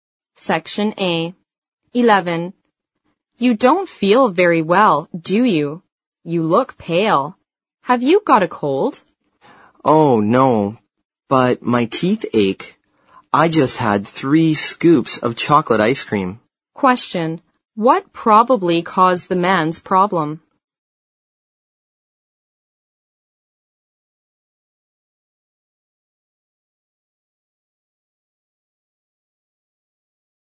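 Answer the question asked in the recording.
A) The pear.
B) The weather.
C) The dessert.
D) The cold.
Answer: C) The dessert.

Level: 四级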